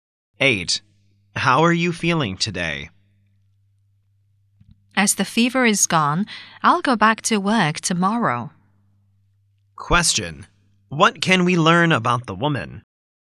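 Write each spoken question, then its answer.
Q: What can we learn about the woman?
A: She has recovered from her fever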